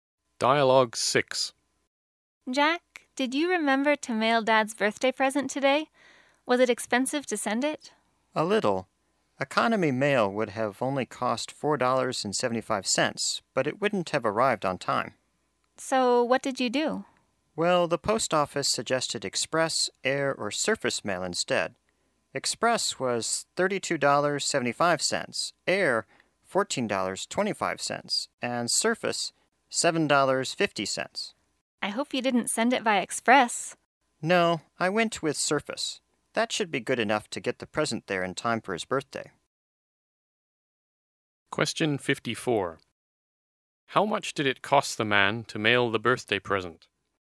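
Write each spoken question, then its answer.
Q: How much did it cost the man to mail the birthday present?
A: $7.50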